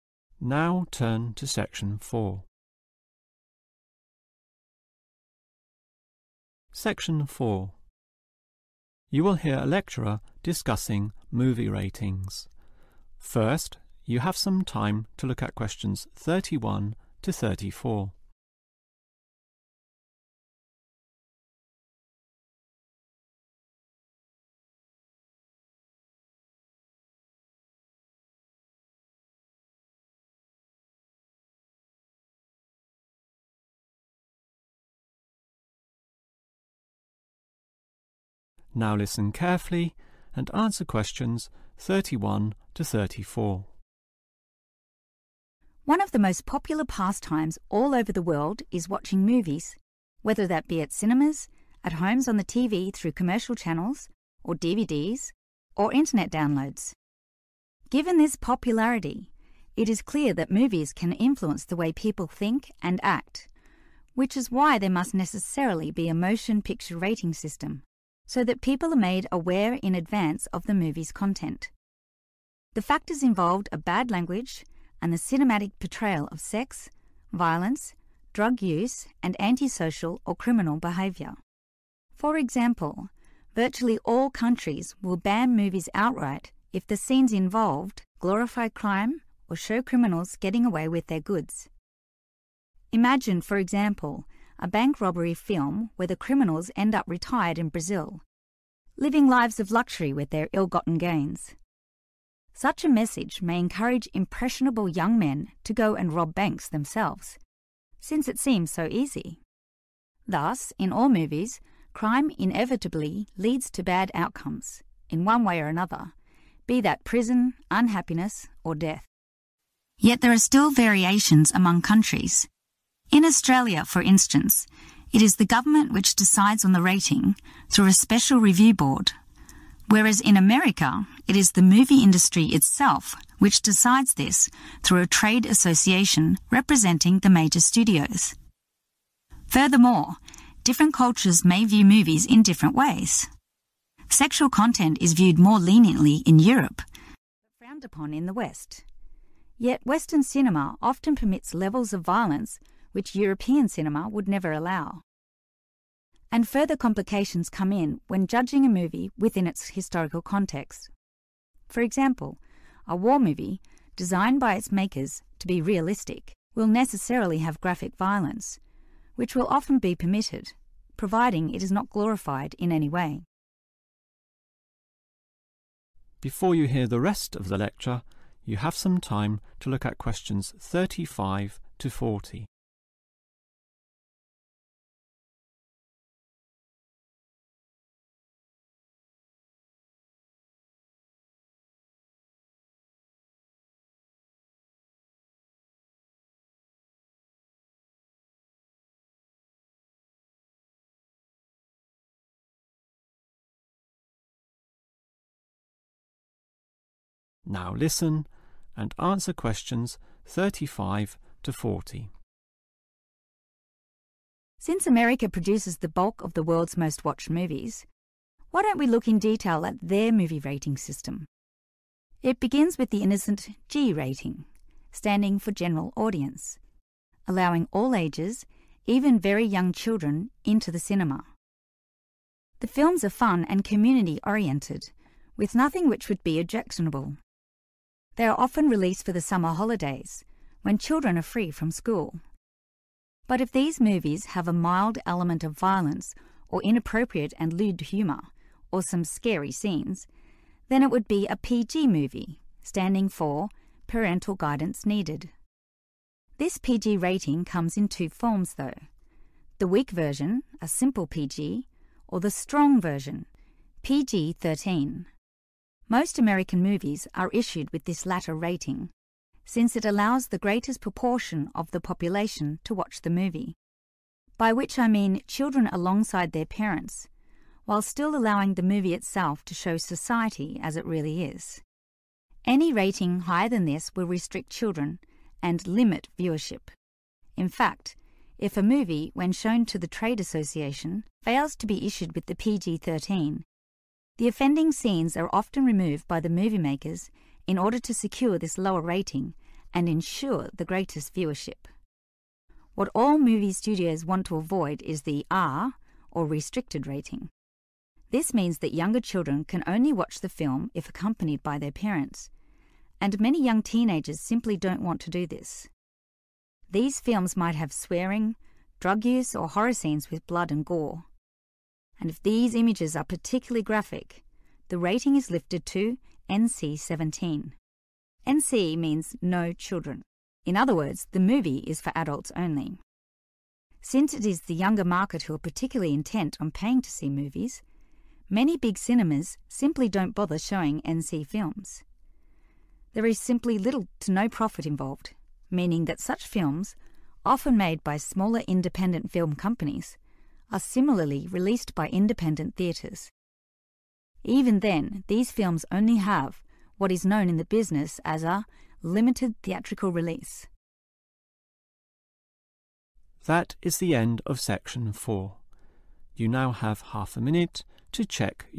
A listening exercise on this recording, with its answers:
Complete the sentences. Write NO MORE THAN TWO WORDS for each answer.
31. Movies are very influential because of their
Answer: popularity

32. In crime movies, the message given is that crime has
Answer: bad outcomes

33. American movies are graded by a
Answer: trade association

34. Violence is allowed in war movies which are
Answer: realistic

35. designed for the whole (35) ...........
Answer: community

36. PG – movie contains some violence, suggestive humour or (36) ............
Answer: scary scenes

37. allows movies to show real (37) .......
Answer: society

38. can maximize (38) ............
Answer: viewership

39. some scenes are especially (39) .........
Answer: graphic

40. such movies made and shown by people (40) ..........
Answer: independent